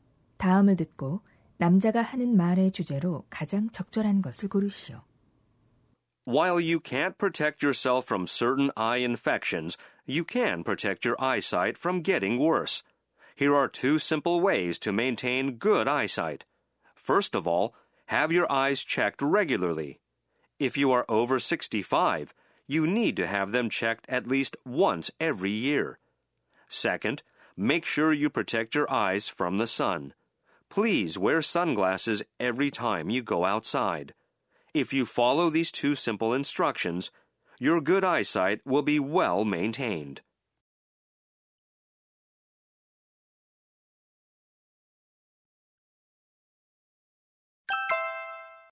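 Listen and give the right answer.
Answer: 좋은 시력을 유지하는 방법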